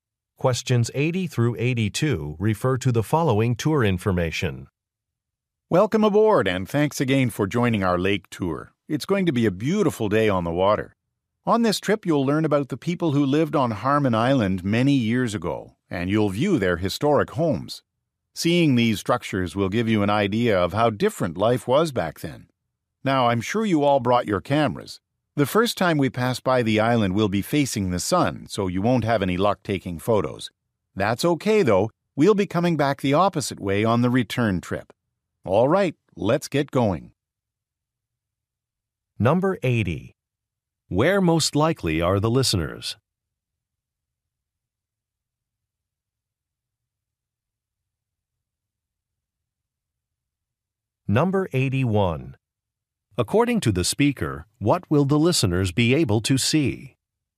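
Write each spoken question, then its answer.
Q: Where most likely are the listeners?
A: On a boat

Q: According to the speaker, what will the listeners be able to see?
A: Historic homes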